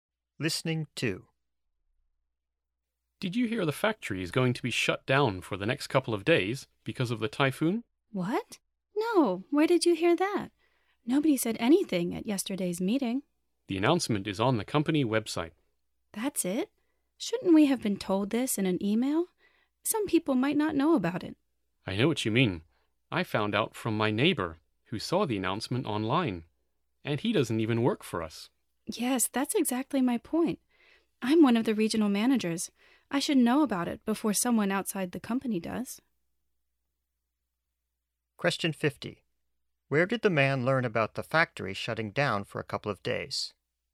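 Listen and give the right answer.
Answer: From his neighbor, who saw it online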